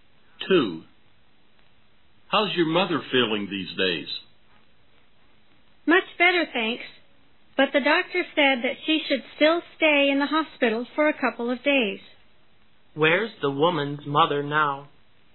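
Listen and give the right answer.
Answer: In the hospital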